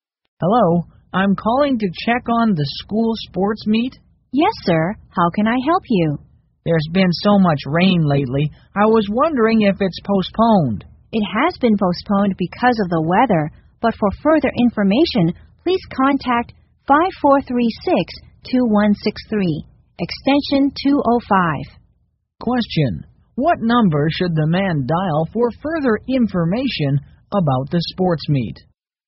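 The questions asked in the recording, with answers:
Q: What number should the man dial for further information about the sports meet?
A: 5436-2163, extension 205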